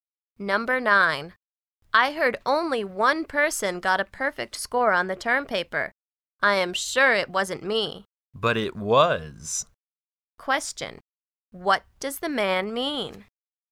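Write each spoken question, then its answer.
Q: What does the man mean?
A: The woman got the perfect score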